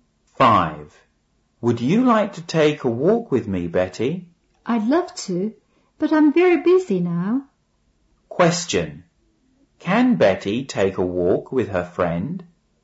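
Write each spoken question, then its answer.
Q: Question. Can Betty take a walk with her friend?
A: No, she can't. She's very busy.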